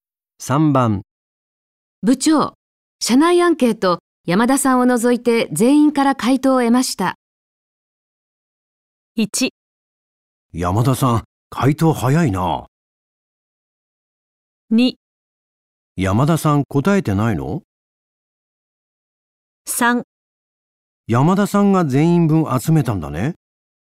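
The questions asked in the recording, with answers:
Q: 部長、社内アンケート、山田さんを除いて全員から回答を得ました。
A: 2: 山田さん、答えてないの?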